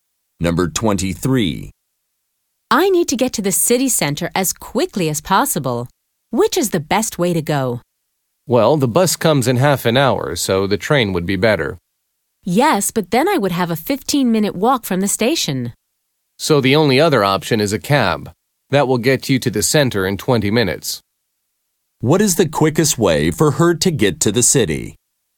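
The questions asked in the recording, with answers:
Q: What is the quickest way for her to get to the city?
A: By cab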